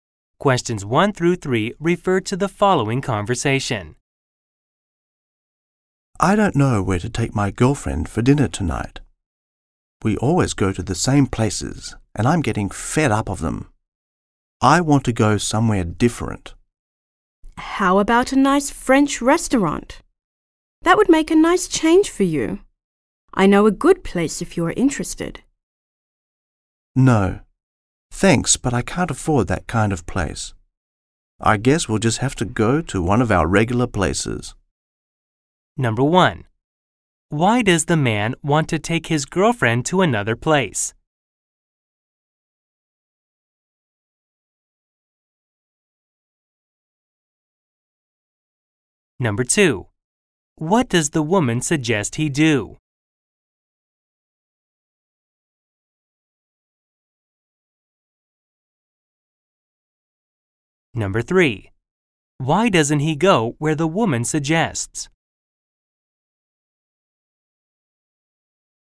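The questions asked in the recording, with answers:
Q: Why does the man want to take his girlfriend to another place?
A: He is fed up with going to the same places and wants somewhere different

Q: What does the woman suggest he do?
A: Go to a nice French restaurant

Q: Why doesn't he go where the woman suggests?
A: He can't afford it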